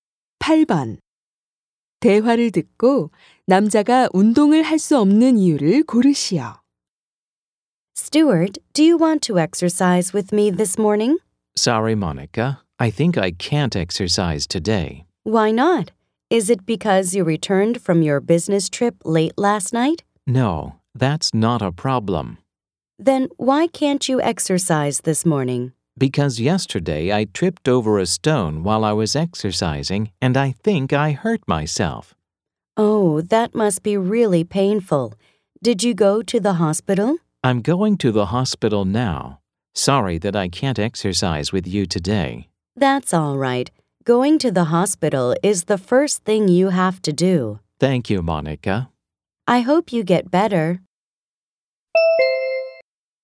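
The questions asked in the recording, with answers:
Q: 대화를 듣고 남자가 운동을 할 수 없는 이유를 고르시오.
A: 어제 운동하다 돌에 걸려 넘어져 다쳐서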